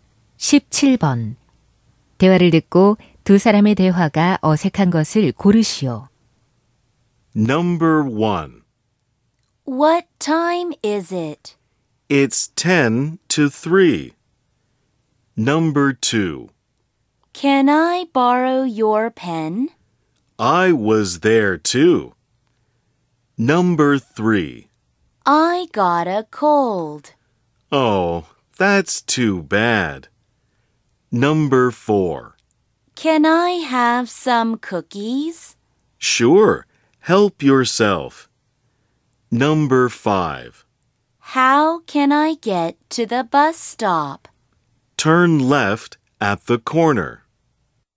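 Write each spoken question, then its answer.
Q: 대화를 듣고 두 사람의 대화가 어색한 것을 고르시오.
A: 2번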